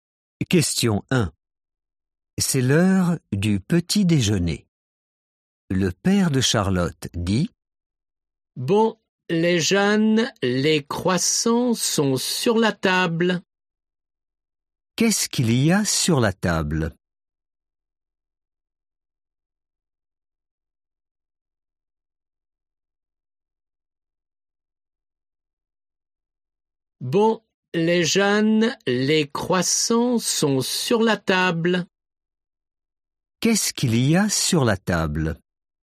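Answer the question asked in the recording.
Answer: Des croissants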